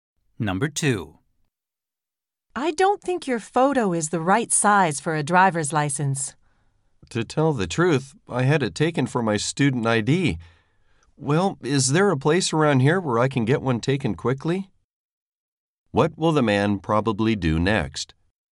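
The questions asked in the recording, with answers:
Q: What will the man probably do next?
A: Get a new photo taken for his driver's license.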